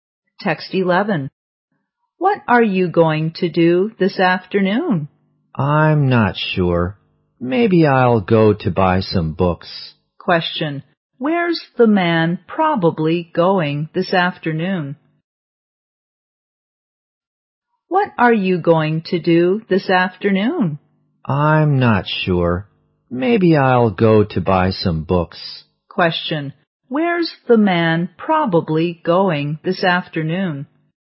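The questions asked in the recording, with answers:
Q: Where's the man probably going this afternoon?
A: To a bookshop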